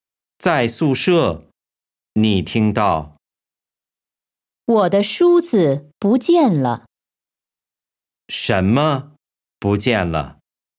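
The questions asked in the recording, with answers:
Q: 什么不见了?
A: 梳子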